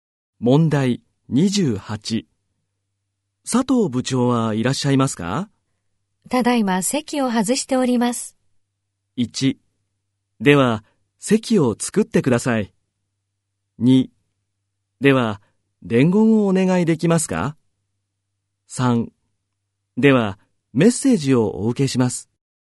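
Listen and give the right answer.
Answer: 2: では伝言をお願いできますか?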